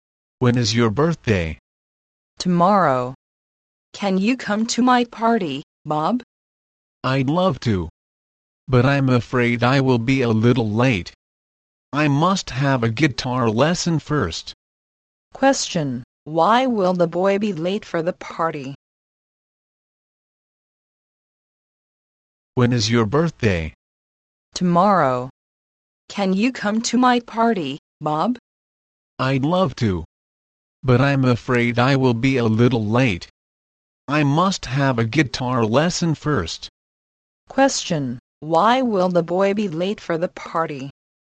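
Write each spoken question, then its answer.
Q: Question, why will the boy be late for the party?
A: He must have a guitar lesson first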